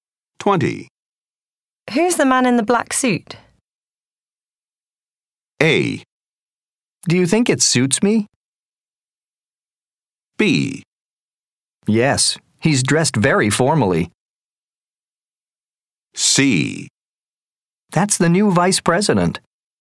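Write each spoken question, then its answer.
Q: Who's the man in the black suit?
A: C: That's the new vice president.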